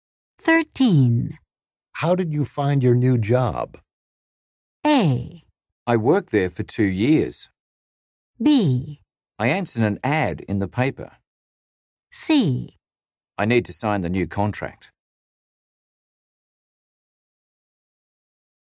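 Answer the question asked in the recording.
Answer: B: I answered an ad in the paper.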